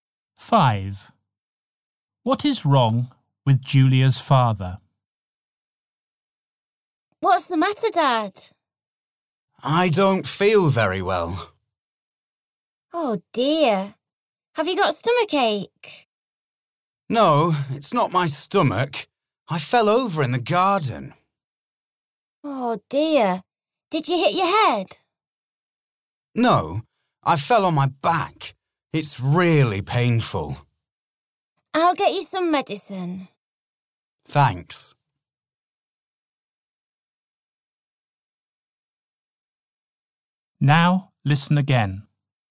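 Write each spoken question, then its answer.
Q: What is wrong with Julia's father?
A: He hurt his back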